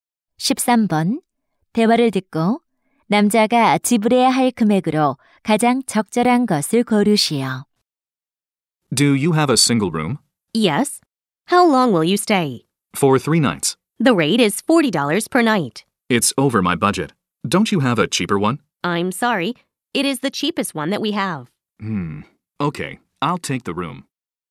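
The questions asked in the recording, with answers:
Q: 대화를 듣고 남자가 지불해야 할 금액으로 가장 적절한 것을 고르시오.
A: 120달러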